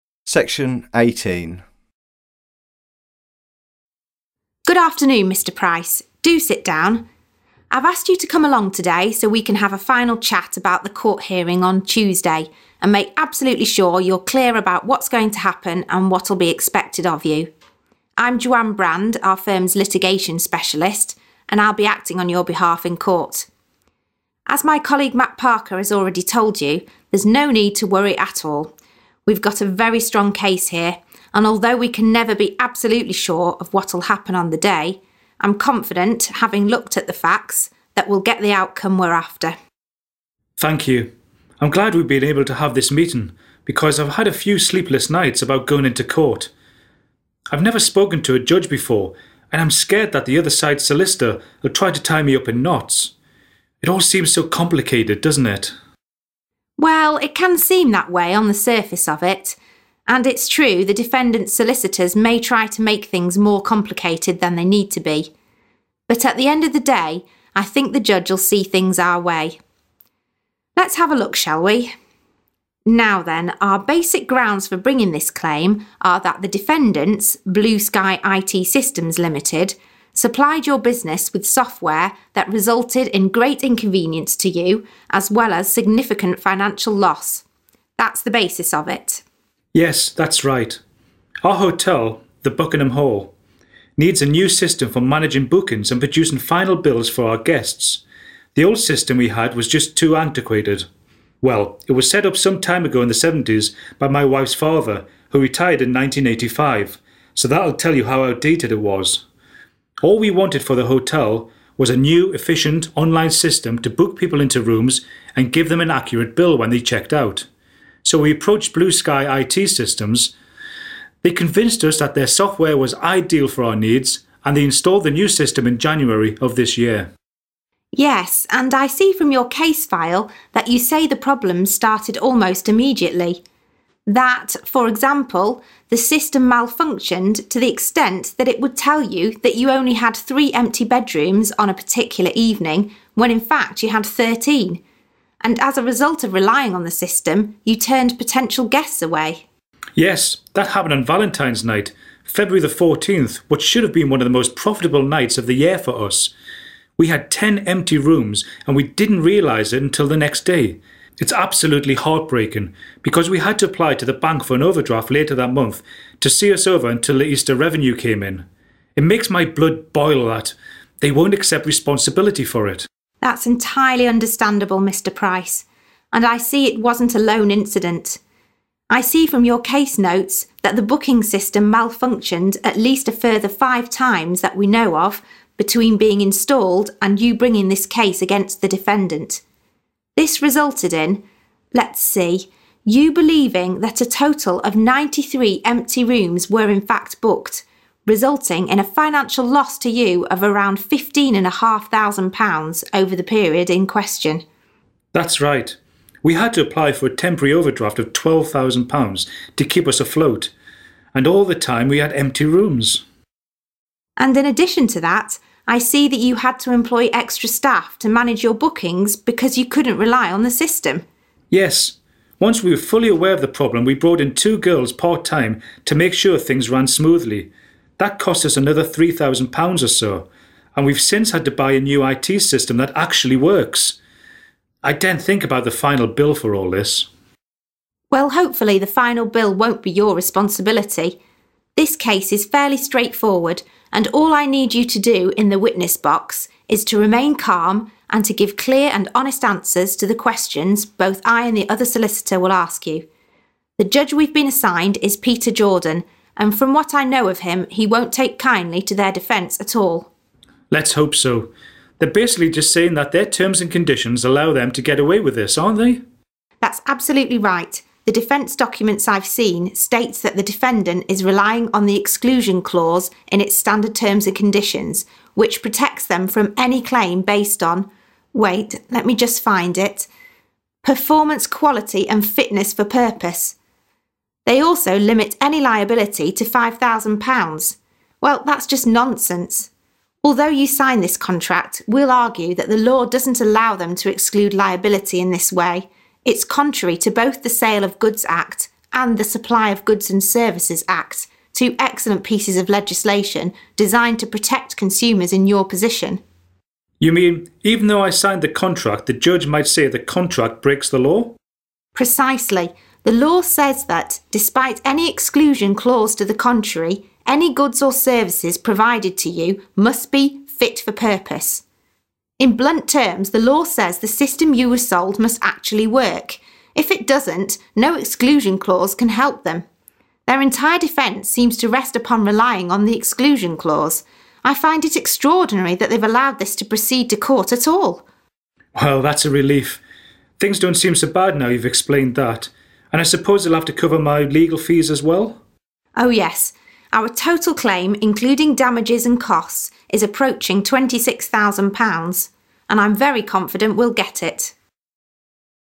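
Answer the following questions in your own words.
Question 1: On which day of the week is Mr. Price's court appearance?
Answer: Tuesday

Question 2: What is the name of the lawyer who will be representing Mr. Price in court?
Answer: Joanne Brand

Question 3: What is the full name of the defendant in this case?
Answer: Blue Sky IT Systems Limited

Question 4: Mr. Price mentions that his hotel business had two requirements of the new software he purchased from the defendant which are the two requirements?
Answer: To book people into rooms and to give guests an accurate bill when they checked out

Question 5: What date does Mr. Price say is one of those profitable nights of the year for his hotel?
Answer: February 14th (Valentine's night)

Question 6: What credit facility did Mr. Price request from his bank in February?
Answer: An overdraft (a temporary overdraft of £12,000)

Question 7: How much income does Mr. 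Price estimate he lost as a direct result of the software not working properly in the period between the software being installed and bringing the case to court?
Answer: Around £15,500

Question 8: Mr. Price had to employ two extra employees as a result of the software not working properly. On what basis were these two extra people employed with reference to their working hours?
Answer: Part-time

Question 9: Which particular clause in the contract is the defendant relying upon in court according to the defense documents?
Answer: The exclusion clause

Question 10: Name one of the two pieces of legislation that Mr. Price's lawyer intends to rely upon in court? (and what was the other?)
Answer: The Sale of Goods Act and the Supply of Goods and Services Act

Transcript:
Lawyer: Good afternoon, Mr Price. Do sit down. I've asked you to come along today so we can have a final chat about the court hearing on Tuesday, and make absolutely sure you're clear about what's going to happen and what'll be expected of you. 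I'm Joanne Brand, our firms' litigation specialist and I'll be acting on your behalf in court. As my colleague Matt Parker has already told you, there's no need to worry at all. We've got a very strong case here, and although we can never be absolutely sure of what'll happen on the day, I'm confident, having looked at the facts, that we"Il get the outcome we're after.
Mr Price: Thank you. I'm glad we've been able to have this meeting because I've had a few sleepless nights about going into court. I've never spoken to a judge before, and I'm scared that the other side's solicitor'll try to tie me up in knots. It all seems so complicated, doesn't it?
Lawyer: Well, it can seem that way on the surface of it. And it's true the defendant's solicitors may try to make things more complicated than they need to be. But at the end of the day, I think the judge'Il see things our way. Let's have a look, shall we? 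Now then, our basic grounds for bringing this claim are that the defendants, Blue Sky IT Systems Limited, supplied your business with software that resulted in great inconvenience to you as well as a significant financial loss. That's the basis of it.
Mr Price: Yes, that's right. Our hotel, The Buckingham Hall, needs a new system for managing bookings and producing final bills for our guests. The old system we had was just too antiquated. Well, it was set up some time ago, in the seventies, by my wife's father, who retired in 1985, so that'll tell you how outdated it was. All we wanted for the hotel was a new, efficient online system to book people into rooms and give them an accurate bill when they checked out. So, we approached Blue Sky IT Systems. They convinced us that their software was ideal for our needs and they installed the new system in January of this year.
Lawyer: Yes. And I see from your case file that you say the problems started almost immediately. 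That, for example, the system malfunctioned to the extent that it would tell you that you only had 3 empty bedrooms on a particular evening, when in fact you had 13. And as a result of relying on the system, you turned potential guests away.
Mr Price: Yes, that happened on Valentine's night, February 14th what should've been one of the most profitable nights of the year for us. We had 10 empty rooms, and we didn't realise it until the next day. It's absolutely heartbreaking, because we had to apply to the bank for an overdraft later that month to see us over until the Easter revenue came in. It makes my blood boil that they won't accept responsibility for it.
Lawyer: That's entirely understandable, Mr Price. And I see it wasn't a lone incident. I see from your case notes that the booking system malfunctioned at least a further 5 times that we know of between being installed, and you bringing this case against the defendant. 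This resulted in, let's see, you believing that a total of 93 empty rooms were in fact booked, resulting in a financial loss to you of around fifteen and a half thousand pounds over the period in question.
Mr Price: That's right. We had to apply for a temporary overdraft of £12,000 to keep us afloat. And all the time we had empty rooms.
Lawyer: And in addition to that, I see that you had to employ extra staff to manage your bookings because you couldn't rely on the system.
Mr Price: Yes, once we were fully aware of the problem, we brought in 2 girls part-time to make sure things ran smoothly. That cost us another £3,000 or so. And we've since had to buy a new I.T. system that actually works! I daren't think about the final bill for all this.
Lawyer: Well hopefully the final bill won't be your responsibility. This case is fairly straightforward and all I need you to do in the witness box is to remain calm, and to give clear and honest answers to the questions both I and the other solicitor will ask you. 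The judge we've been assigned is Peter Jordan, and from what I know of him, he won't take kindly to their defence at all.
Mr Price: Let's hope so. They're basically just saying that their terms and conditions allow them to get away with this, aren't they?
Lawyer: That's absolutely right. The defence documents I've seen state that the defendant is relying on the exclusion clause in its standard terms and conditions, which protects them from any claim based on, wait, let me just find it..., "performance, quality and fitness for purpose". They also limit any liability to £5000. Well, that's just nonsense. Although you signed this contract, we'll argue that the law doesn't allow them to exclude liability in this way. It's contrary to both The Sale of Goods Act, and The Supply of Goods and Services Act, two excellent pieces of legislation designed to protect consumers in your position.
Mr Price: You mean, even though I signed the contract, the judge might say the contract breaks the law?
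Lawyer: Precisely. The law says that, despite any exclusion clause to the contrary, any goods or services provided to you must be 'fit for purpose'. In blunt terms, the law says the system you were sold must actually work. If it doesn't, no exclusion clause can help them. Their entire defence seems to rest upon relying on the exclusion clause. I find it extraordinary that they've allowed this to proceed to court at all.
Mr Price: Well, that's a relief. Things don't seem so bad now you've explained that. And I suppose they'll have to cover my legal fees as well?
Lawyer: Oh yes. Our total claim, including damages and costs is approaching £26,000. And I'm very confident we'll get it.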